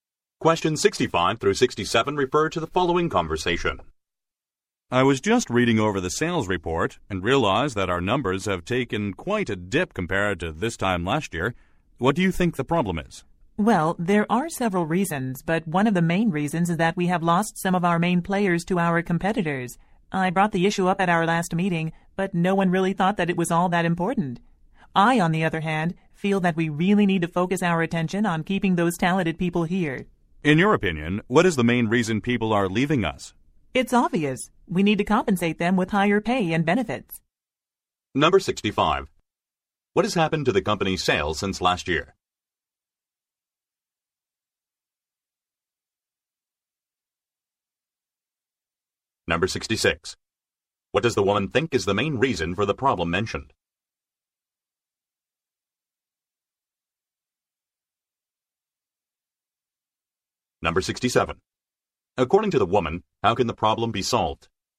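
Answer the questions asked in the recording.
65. They have dropped
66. Key employees have left for competitors
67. Higher pay and benefits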